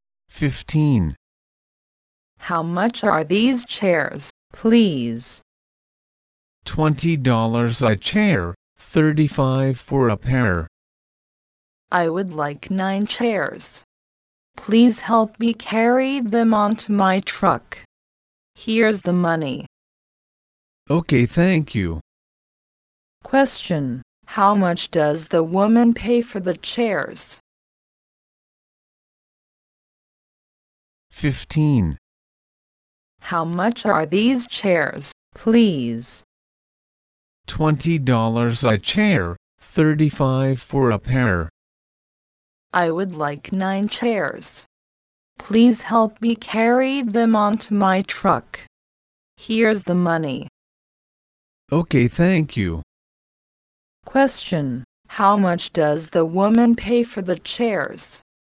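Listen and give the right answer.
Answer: $160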